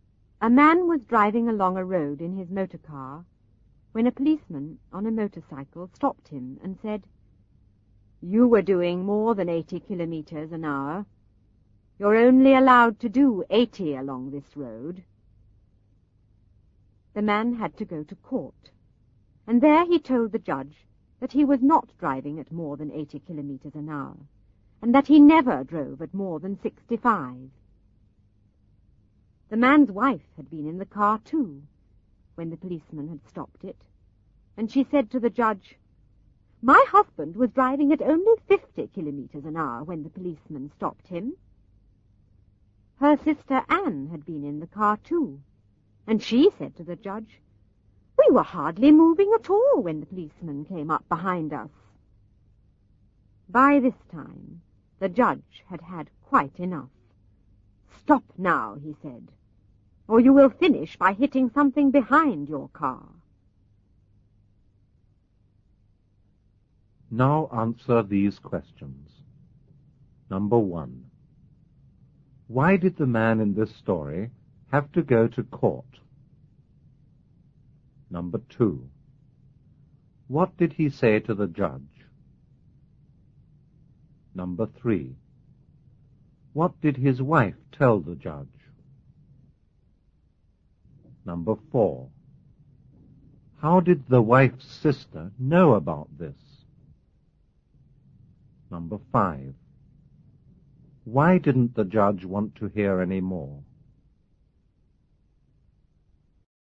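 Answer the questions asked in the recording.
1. A policeman said he was driving faster than 80 kilometers an hour, over the limit.
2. That he was not driving at more than 80 and never drove at more than 65 kilometers an hour.
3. That her husband was driving at only 50 kilometers an hour.
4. She had been in the car too.
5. Each story made the speed lower, so soon they would say the car was going backwards and hit something behind it.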